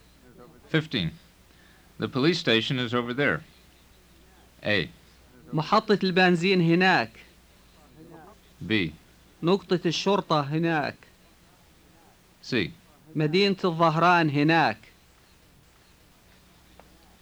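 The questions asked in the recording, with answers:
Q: The police station is over there.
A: B: نقطة الشرطة هناك.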